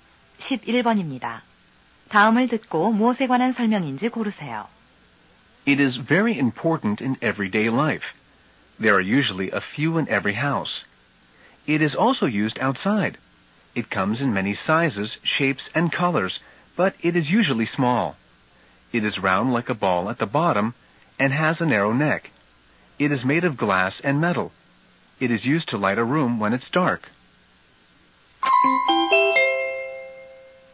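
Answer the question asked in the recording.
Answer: 전구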